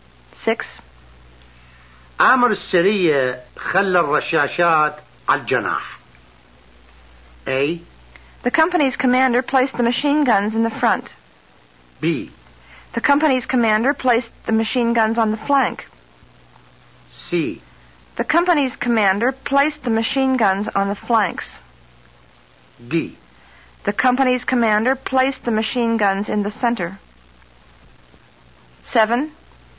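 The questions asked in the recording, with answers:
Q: أمر السرية خلى الرشاشات على الجناح.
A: B: The company's commander placed the machine guns on the flank.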